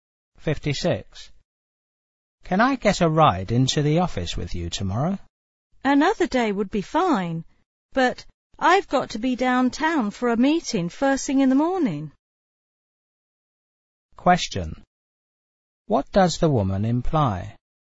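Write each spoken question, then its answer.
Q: What does the woman imply?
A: She can't give him a ride tomorrow because she has a meeting downtown early.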